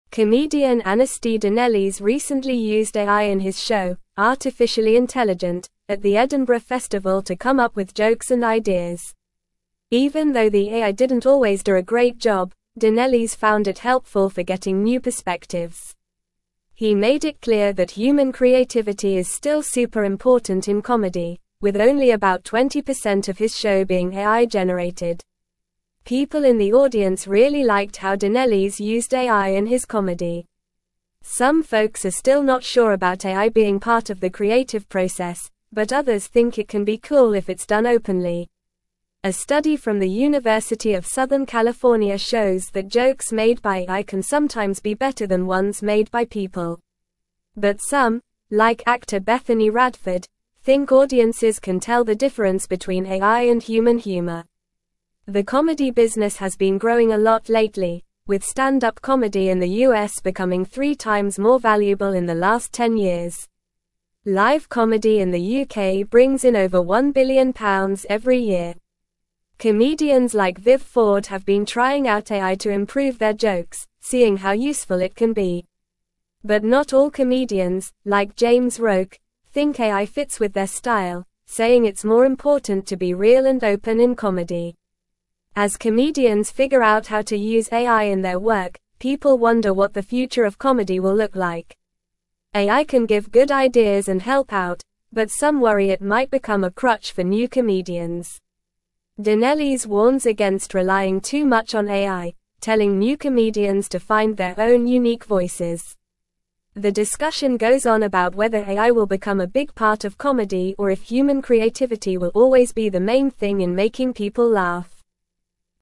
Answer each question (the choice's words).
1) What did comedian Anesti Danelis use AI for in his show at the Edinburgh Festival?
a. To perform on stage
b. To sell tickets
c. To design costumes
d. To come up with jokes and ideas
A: To come up with jokes and ideas

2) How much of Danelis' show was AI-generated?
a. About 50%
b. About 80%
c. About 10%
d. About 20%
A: About 20%

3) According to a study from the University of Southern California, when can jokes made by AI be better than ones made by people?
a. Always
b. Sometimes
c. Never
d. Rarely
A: Sometimes

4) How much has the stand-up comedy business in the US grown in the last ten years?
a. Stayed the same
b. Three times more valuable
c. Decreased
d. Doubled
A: Three times more valuable

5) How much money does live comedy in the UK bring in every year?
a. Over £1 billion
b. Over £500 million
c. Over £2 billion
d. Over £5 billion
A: Over £1 billion

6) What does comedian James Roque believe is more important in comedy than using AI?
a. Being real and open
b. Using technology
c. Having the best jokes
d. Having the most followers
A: Being real and open

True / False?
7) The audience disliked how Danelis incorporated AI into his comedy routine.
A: False

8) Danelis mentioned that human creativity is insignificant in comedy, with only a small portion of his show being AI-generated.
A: False

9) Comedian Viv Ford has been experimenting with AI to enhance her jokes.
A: True

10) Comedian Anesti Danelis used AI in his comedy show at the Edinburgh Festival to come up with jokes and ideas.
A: True

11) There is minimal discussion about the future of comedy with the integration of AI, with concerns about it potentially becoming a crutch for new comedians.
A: False

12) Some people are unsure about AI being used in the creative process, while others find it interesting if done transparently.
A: True

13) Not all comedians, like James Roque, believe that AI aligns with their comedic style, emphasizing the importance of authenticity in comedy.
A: True

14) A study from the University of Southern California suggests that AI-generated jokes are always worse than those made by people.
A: False

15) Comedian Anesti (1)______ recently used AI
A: Danelis

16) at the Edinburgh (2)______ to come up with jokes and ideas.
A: Festival

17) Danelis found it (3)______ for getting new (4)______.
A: helpful

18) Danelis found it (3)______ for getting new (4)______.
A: perspectives

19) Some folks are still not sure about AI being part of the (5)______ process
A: creative

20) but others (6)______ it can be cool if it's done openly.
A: think

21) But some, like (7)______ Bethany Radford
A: actor

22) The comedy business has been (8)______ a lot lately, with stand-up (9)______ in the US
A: growing

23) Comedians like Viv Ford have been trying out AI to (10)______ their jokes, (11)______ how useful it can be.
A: improve

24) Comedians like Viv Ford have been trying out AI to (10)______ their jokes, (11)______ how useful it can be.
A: seeing

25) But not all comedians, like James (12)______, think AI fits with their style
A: Roque

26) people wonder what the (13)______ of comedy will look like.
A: future

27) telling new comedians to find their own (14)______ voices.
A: unique

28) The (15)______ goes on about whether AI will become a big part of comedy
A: discussion

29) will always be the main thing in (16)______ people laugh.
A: making

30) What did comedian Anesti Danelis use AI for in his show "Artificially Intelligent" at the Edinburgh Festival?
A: Danelis used AI to come up with jokes and ideas for his comedy show.

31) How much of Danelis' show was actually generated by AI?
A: About 20% of Danelis' show was AI-generated.

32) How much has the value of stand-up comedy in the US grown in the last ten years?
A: Stand-up comedy in the US has become three times more valuable in the last ten years.

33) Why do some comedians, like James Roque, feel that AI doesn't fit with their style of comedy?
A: Some comedians, like James Roque, feel that AI doesn't fit with their style of comedy because they believe it's more important to be real and open in their comedy.

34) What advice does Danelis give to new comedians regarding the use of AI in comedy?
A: Danelis advises new comedians not to rely too much on AI and to find their own unique voices in comedy.

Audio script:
Comedian Anesti Danelis recently used AI in his show "Artificially Intelligent" at the Edinburgh Festival to come up with jokes and ideas. Even though the AI didn't always do a great job, Danelis found it helpful for getting new perspectives. He made it clear that human creativity is still super important in comedy, with only about 20% of his show being AI-generated.
People in the audience really liked how Danelis used AI in his comedy. Some folks are still not sure about AI being part of the creative process, but others think it can be cool if it's done openly. A study from the University of Southern California shows that jokes made by AI can sometimes be better than ones made by people. But some, like actor Bethany Radford, think audiences can tell the difference between AI and human humor.
The comedy business has been growing a lot lately, with stand-up comedy in the US becoming three times more valuable in the last ten years. Live comedy in the UK brings in over £1 billion every year. Comedians like Viv Ford have been trying out AI to improve their jokes, seeing how useful it can be. But not all comedians, like James Roque, think AI fits with their style, saying it's more important to be real and open in comedy.
As comedians figure out how to use AI in their work, people wonder what the future of comedy will look like. AI can give good ideas and help out, but some worry it might become a crutch for new comedians. Danelis warns against relying too much on AI, telling new comedians to find their own unique voices. The discussion goes on about whether AI will become a big part of comedy or if human creativity will always be the main thing in making people laugh.

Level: Level 3